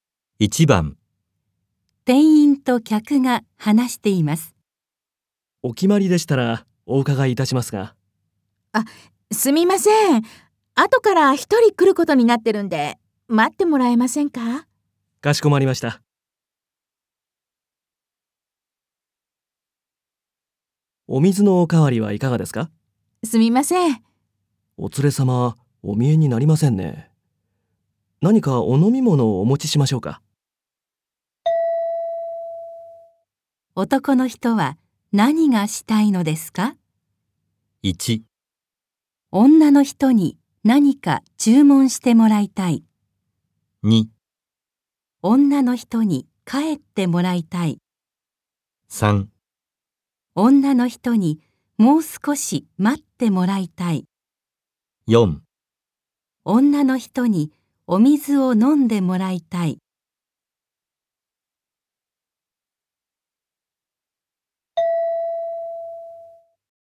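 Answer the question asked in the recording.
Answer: 1: 女の人に何か注文してもらいたい。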